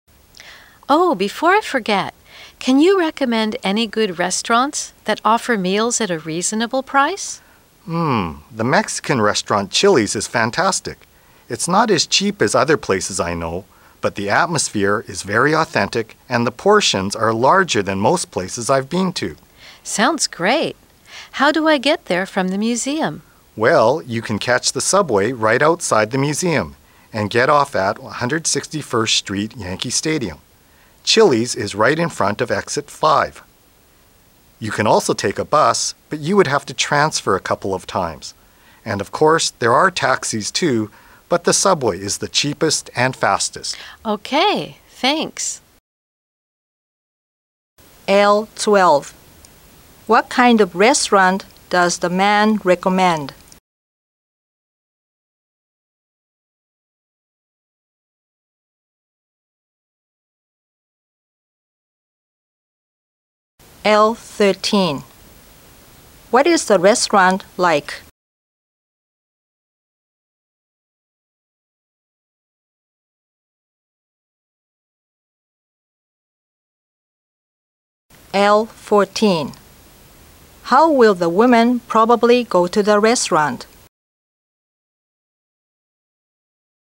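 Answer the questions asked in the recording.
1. A Mexican restaurant
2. It has an authentic atmosphere and large portions, but it is not very cheap
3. By subway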